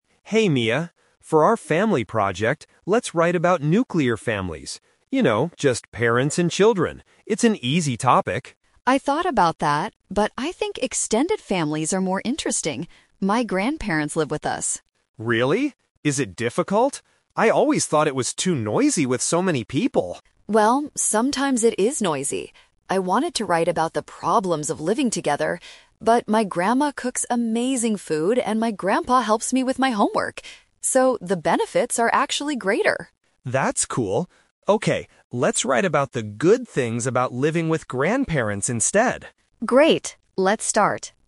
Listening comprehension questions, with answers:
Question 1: What kind of family did Leo want to write about at first?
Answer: A family with only parents and children.

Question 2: What does Mia think is a problem with her extended family?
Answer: It is sometimes noisy.

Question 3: What will the students focus on for their project?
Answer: The benefits of living with grandparents.

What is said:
Leo: Hey, Mia. For our family project, let's write about nuclear families. You know, just parents and children. It's an easy topic.
Mia: I thought about that, but I think extended families are more interesting. My grandparents live with us.
Leo: Really? Is it difficult? I always thought it was too noisy with so many people.
Mia: Well, sometimes it is noisy. I wanted to write about the problems of living together, but my grandma cooks amazing food and my grandpa helps me with my homework. So, the benefits are actually greater.
Leo: That's cool. Okay, let's write about the good things about living with grandparents instead.